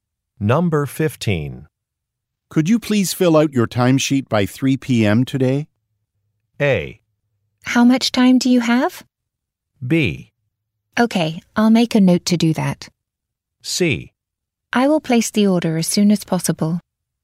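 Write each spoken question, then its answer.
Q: Could you please fill out your timesheet by 3 p.m.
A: B: Okay, I'll make a note to do that.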